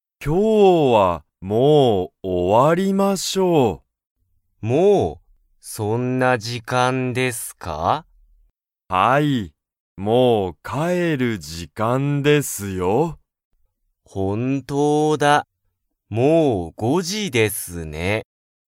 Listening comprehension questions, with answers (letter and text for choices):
Comprehension Quiz (Skip if you don't understand the conversation yet)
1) 早川(はやかわ)さんと佐藤(さとう)さんは、もう帰(かえ)る時間(じかん)ですか?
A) はい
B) いいえ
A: A) はい

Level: Level 1